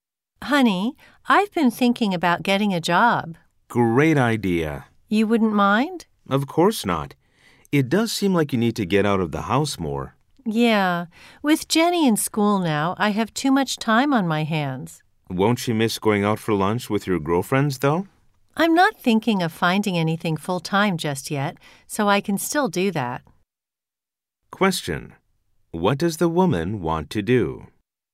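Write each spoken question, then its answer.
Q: What does the woman want to do?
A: Get a part-time job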